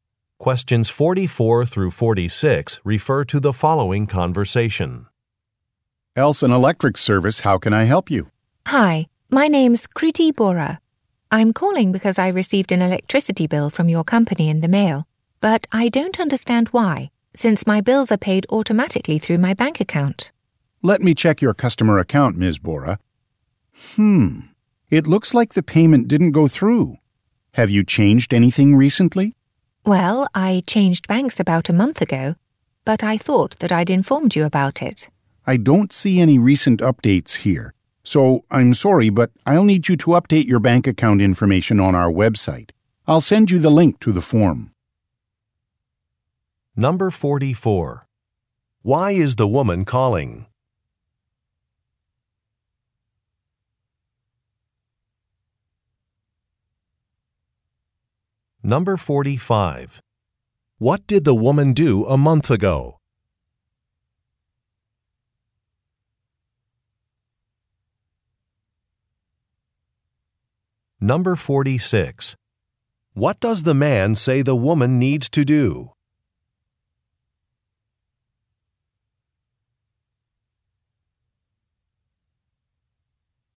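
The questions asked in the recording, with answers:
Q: Why is the woman calling?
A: She received an electricity bill she doesn't understand, since her bills are paid automatically.

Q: What did the woman do a month ago?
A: She changed banks.

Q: What does the man say the woman needs to do?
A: Update her bank account information on the website.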